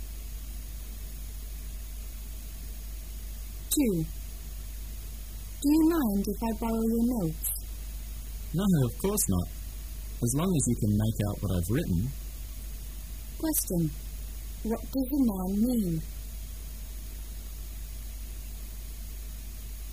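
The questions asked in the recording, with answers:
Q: What does the man mean?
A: He doesn't mind lending his notes, though his writing may be hard to read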